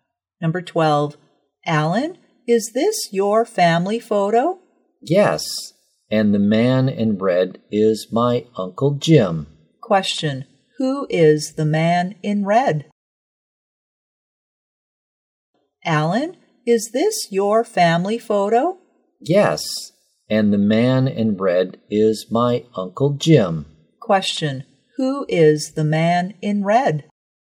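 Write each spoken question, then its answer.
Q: who is the man in red?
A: Uncle Jim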